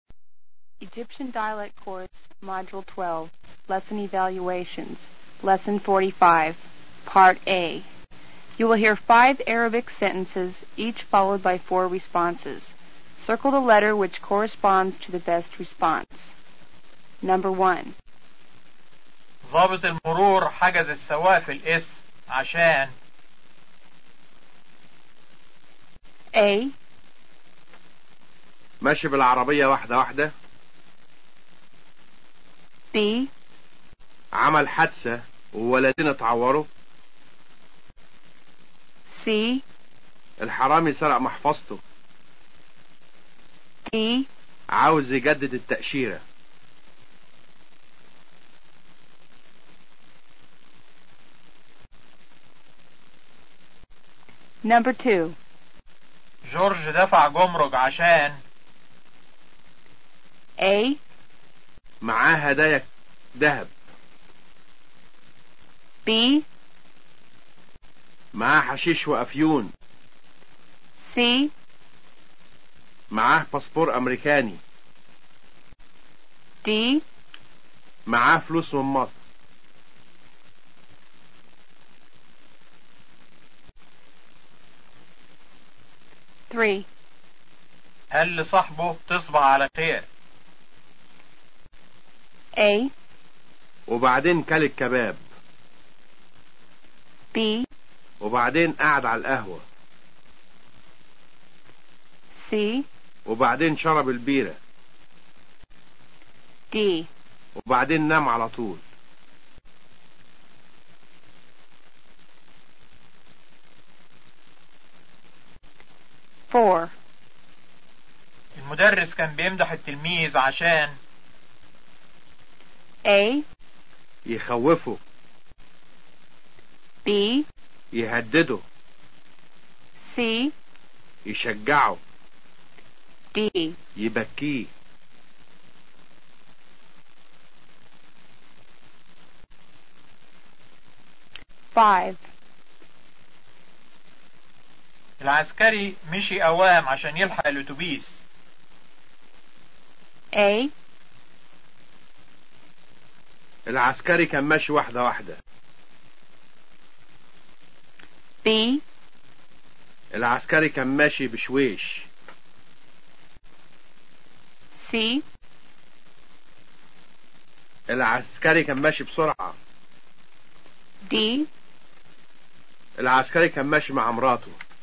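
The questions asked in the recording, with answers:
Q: ضابط المرور حجز السواق في القسم عشان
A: B: عمل حادثة وولدين اتعوروا.

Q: جورج دفع جمرك عشان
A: A: معاه هدايا ذهب.

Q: المدرس كان بيمدح التلميذ عشان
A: C: يشجعه.

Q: العسكري مشي أوام عشان يلحق الأتوبيس.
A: C: العسكري كان ماشي بسرعة.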